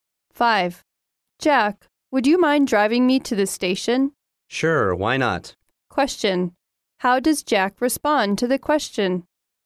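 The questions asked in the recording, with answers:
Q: How does Jack respond to the question?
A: He agrees to drive her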